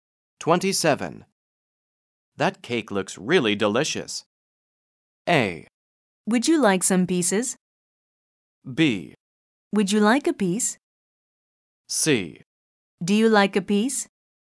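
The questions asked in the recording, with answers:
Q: That cake looks really delicious.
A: B: Would you like a piece?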